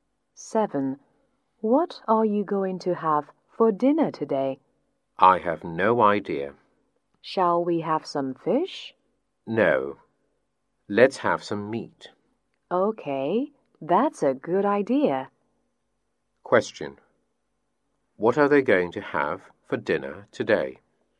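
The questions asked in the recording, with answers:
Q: What are they going to have for dinner today?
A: Meat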